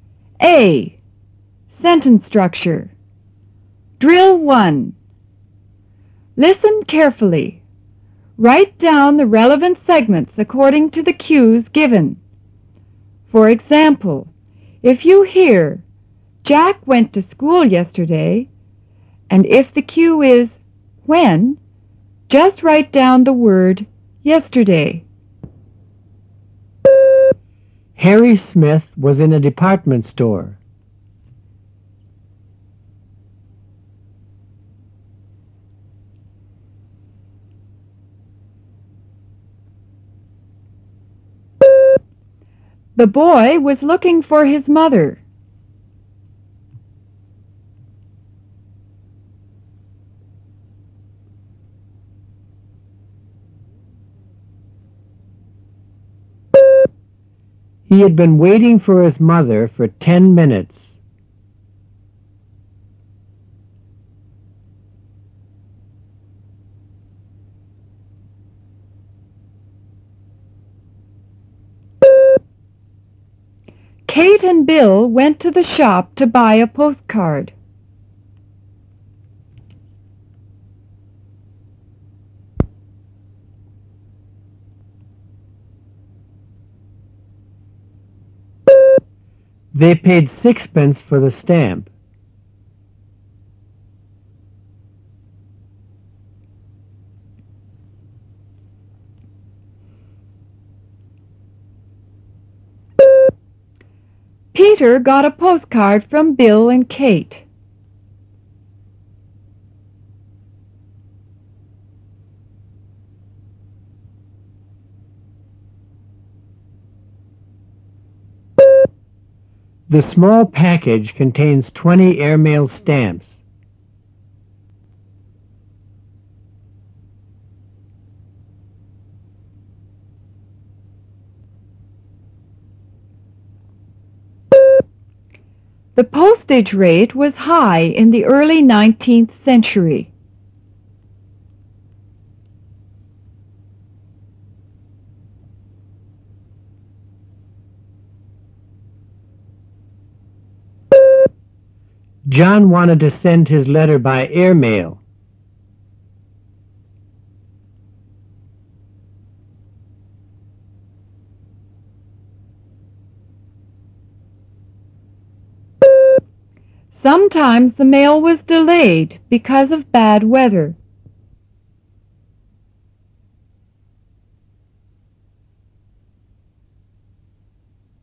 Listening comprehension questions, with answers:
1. Where?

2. Whom?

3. How long?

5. How much?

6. From whom?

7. How many?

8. What?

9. How?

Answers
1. In a department store.
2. His mother.
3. 10 minutes.
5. six pence.
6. Bill and Kate.
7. 20
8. The postage rate.
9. By airmail.